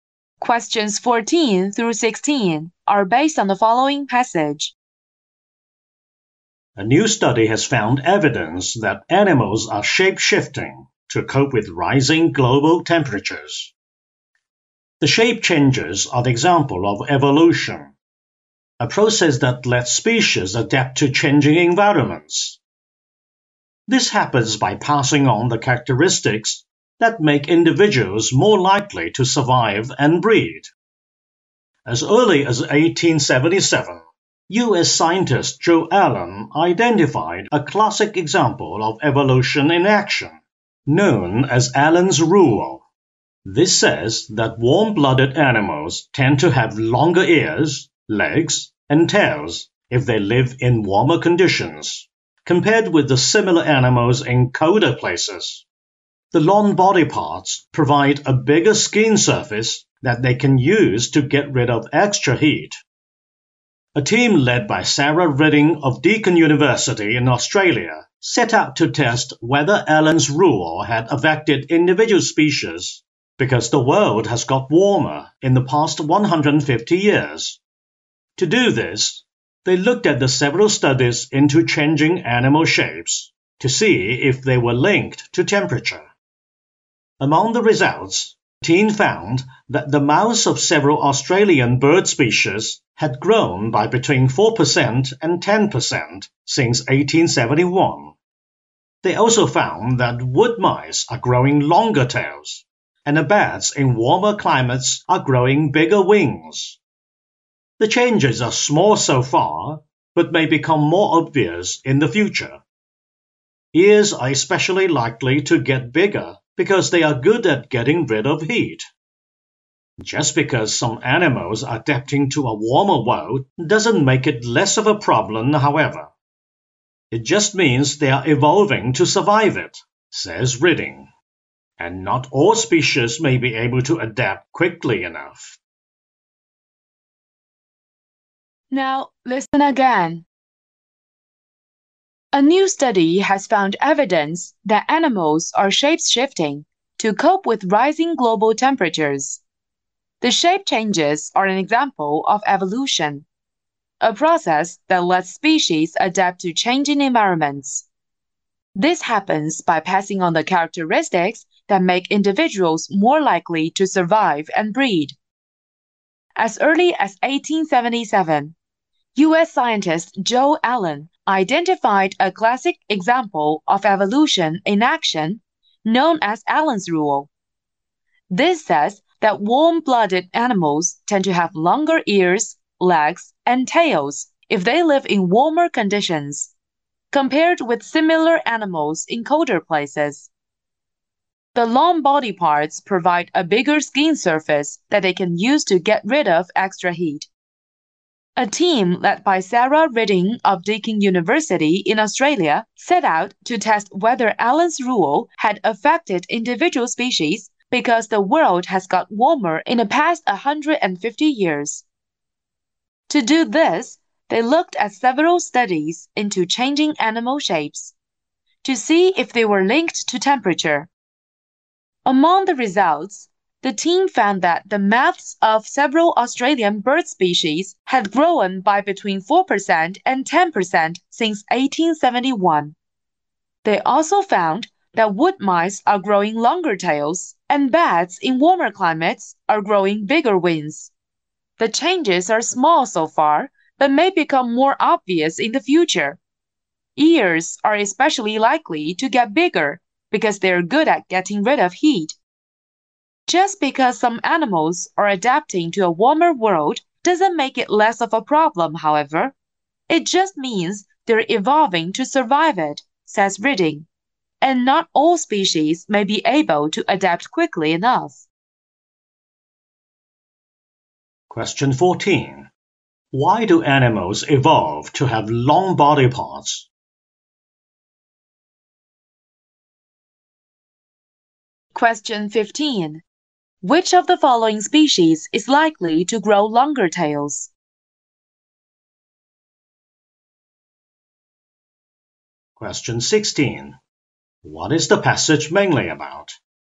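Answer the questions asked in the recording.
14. To get rid of extra heat.
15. Wood mice
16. Animals are changing shape to cope with rising global temperatures.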